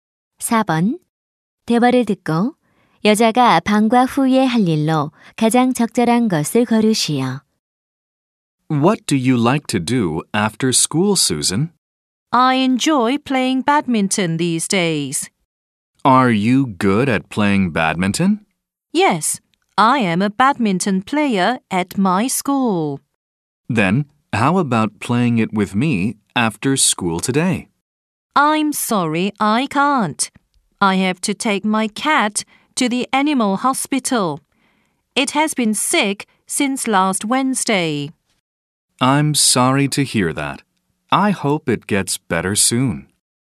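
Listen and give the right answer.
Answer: 고양이를 동물병원에 데려가기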